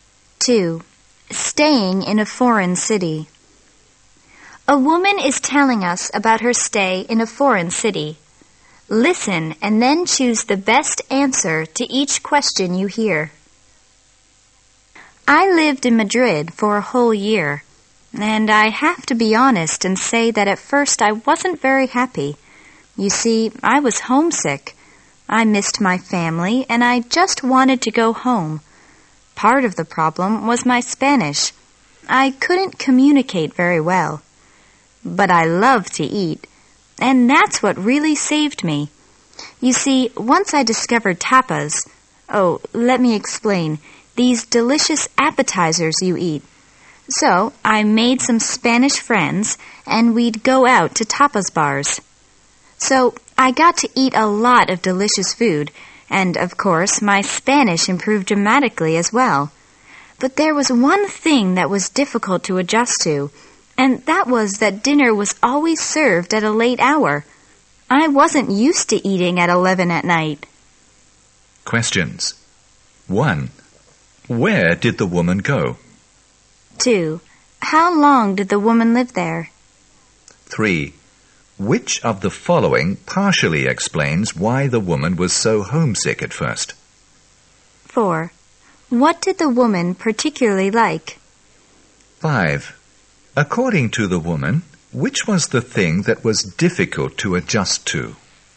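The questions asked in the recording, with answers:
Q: Where did the woman go?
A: Madrid

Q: How long did the woman live there?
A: A whole year

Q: What did the woman particularly like?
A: Eating, especially tapas

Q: According to the woman, which was the thing that was difficult to adjust to?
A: Dinner was always served late, at 11 at night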